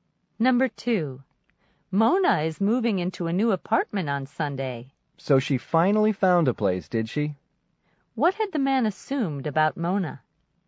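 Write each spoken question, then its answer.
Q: What had the man assumed about Mona?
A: That she hadn't found an apartment yet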